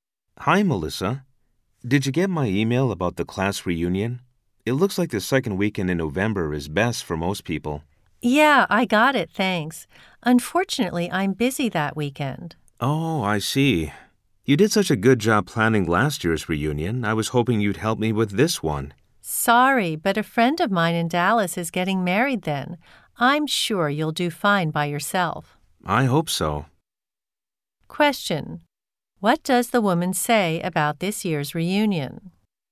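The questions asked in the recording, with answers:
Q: What does the woman say about this year's reunion?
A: She can't go because she has a friend's wedding in Dallas that weekend.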